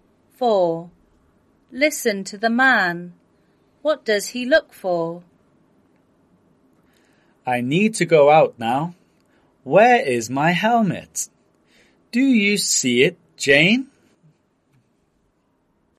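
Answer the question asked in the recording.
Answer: His helmet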